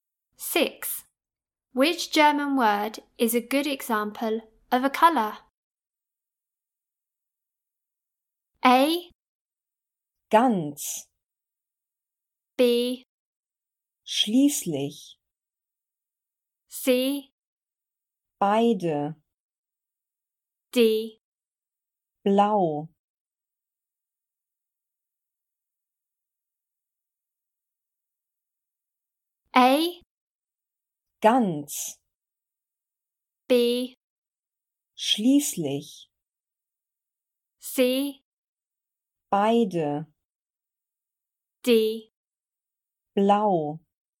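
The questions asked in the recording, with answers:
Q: Which German word is a good example of a color?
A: D: Blau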